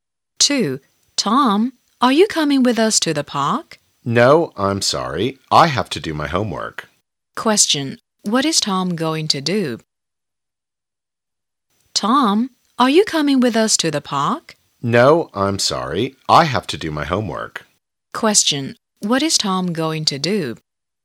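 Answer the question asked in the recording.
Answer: Do his homework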